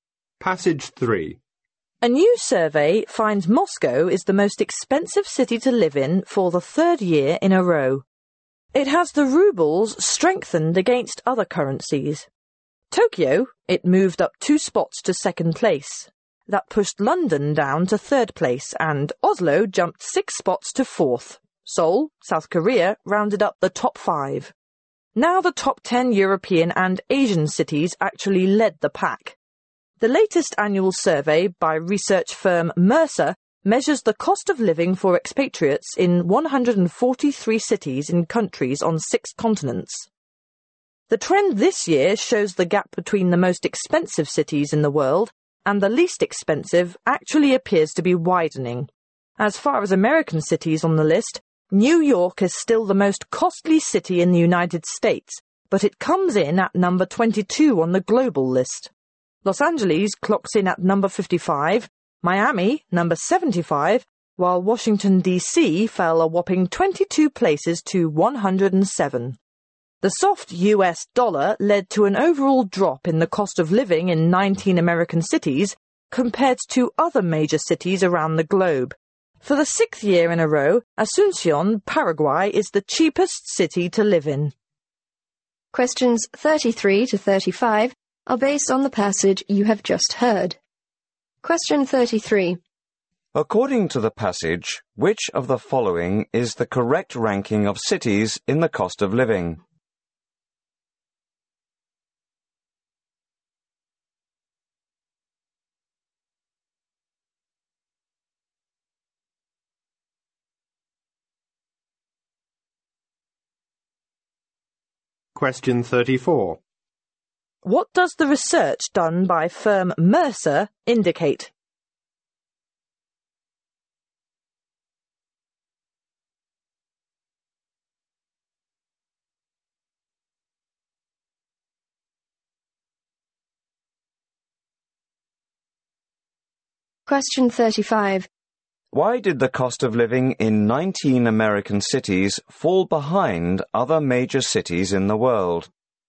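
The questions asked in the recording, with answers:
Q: According to the passage, which of the following is the correct ranking of cities in the cost of living?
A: Moscow, Tokyo, London, Oslo, Seoul

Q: What does the research done by firm Mercer indicate?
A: The gap between the most and least expensive cities is widening.

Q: Why did the cost of living in 19 American cities fall behind other major cities in the world?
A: Because of the soft U.S. dollar.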